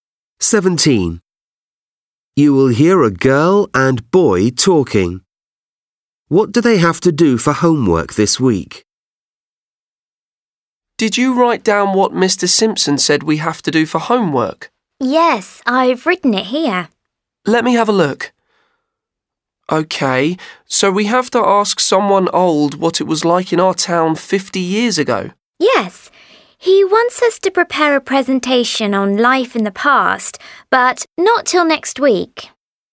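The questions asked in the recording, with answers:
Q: What do they have to do for homework this week?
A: Ask someone old what life was like in their town 50 years ago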